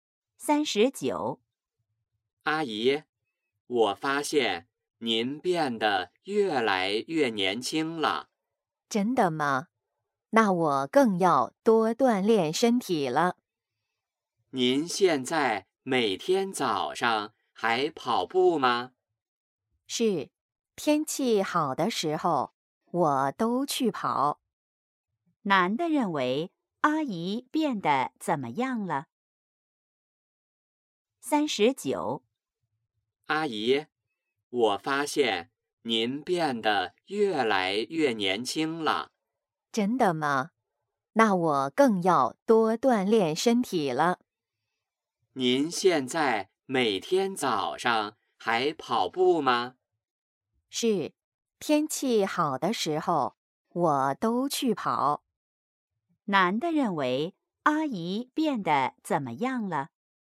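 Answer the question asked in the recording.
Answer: 越来越年轻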